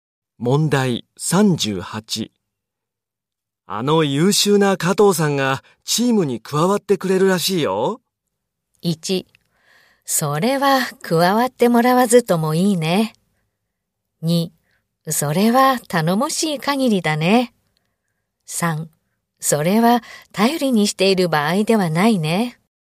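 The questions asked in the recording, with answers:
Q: あの優秀な加藤さんがチームに加わってくれるらしいよ。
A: 2: それは頼もしい限りだね。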